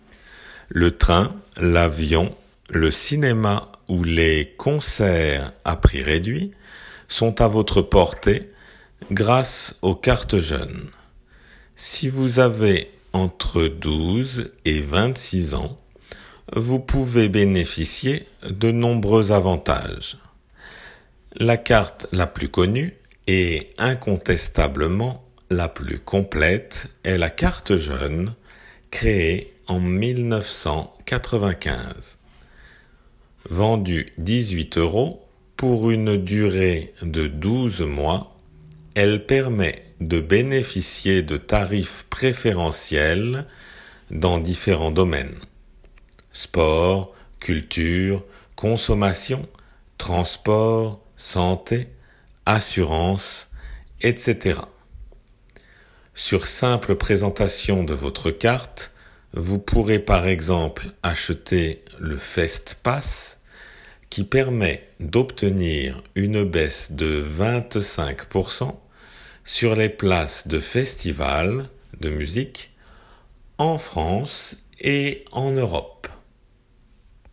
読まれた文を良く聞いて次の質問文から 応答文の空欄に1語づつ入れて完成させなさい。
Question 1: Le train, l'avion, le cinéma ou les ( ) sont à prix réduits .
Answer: concerts

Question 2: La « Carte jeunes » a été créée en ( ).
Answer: 1995

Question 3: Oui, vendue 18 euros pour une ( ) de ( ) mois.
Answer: durée 12

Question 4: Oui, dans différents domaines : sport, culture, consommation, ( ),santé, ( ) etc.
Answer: transport assurance

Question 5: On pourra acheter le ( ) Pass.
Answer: Fest

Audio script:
Le train, l'avion, le cinéma ou les concerts à prix réduits sont à votre portée grâce aux « cartes jeunes ». Si vous avez entre 12 et 26 ans, vous pouvez bénéficier de nombreux avantages.La carte la plus connue et incontestablement la plus complète est la « Carte jeunes » créée en 1995. Vendue 18 euros pour une durée de 12 mois, elle permet de bénéficier de tarifs préférentiels dans différents domaines : sport, culture, consommation, transport, santé, assurance, etc. Sur simple présentation de votre carte vous pourrez par exemple acheter le Fest Pass qui permet d'obtenir une baisse de 25 % sur les places de festivals de musique en France et en Europe.

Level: 仏検2級